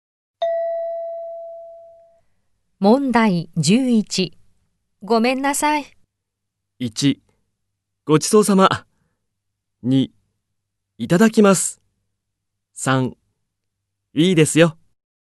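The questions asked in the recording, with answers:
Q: ごめんなさい。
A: 3: いいですよ。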